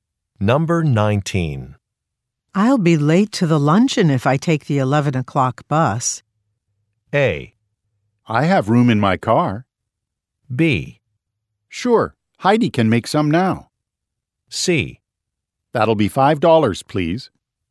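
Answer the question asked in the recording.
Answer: A: I have room in my car.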